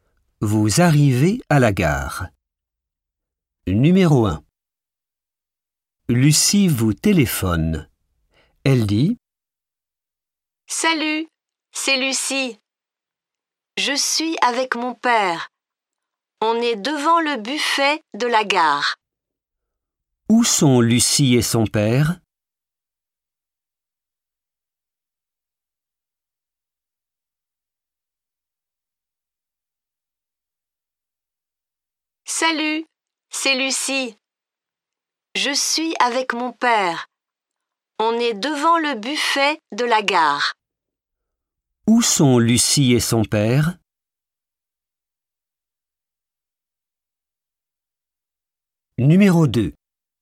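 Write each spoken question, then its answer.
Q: Où sont Lucie et son père?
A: Devant le buffet de la gare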